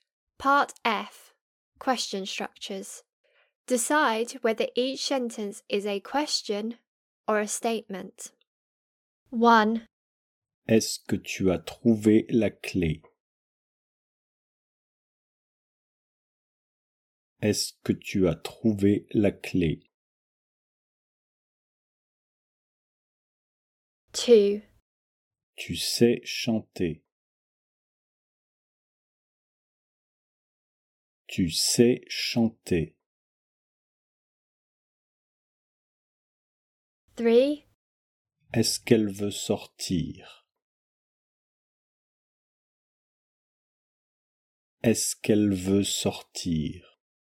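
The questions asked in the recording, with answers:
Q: Est-ce que tu as trouvé la clé?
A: question

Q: Est-ce qu'elle veut sortir?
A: question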